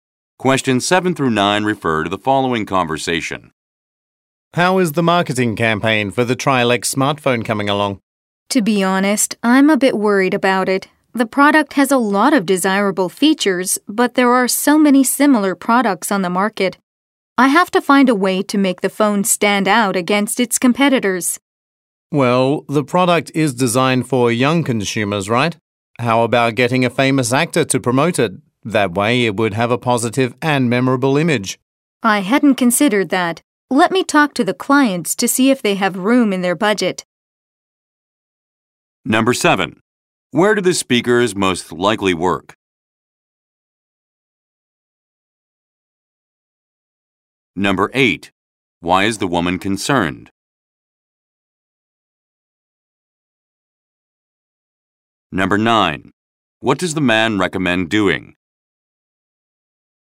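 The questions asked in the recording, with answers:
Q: Why is the woman concerned?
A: There are many similar products on the market

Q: What does the man recommend doing?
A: Getting a famous actor to promote the phone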